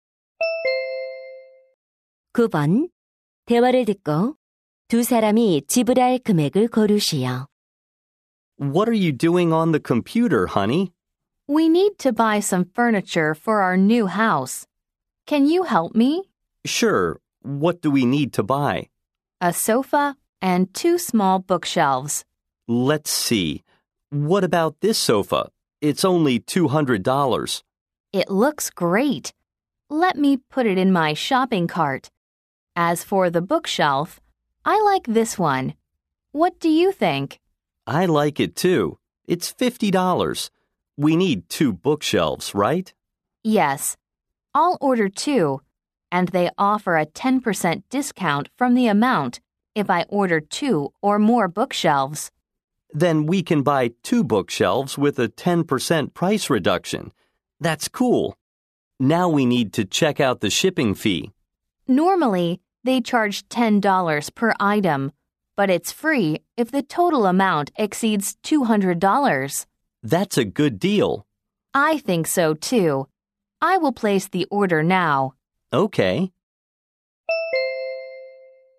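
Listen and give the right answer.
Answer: $290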